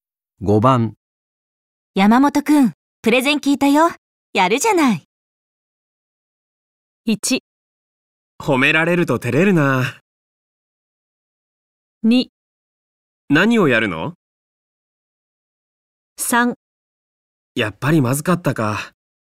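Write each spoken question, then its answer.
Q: 山本くん、プレゼン聞いたよ。やるじゃない。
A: 1: 褒められると照れるな。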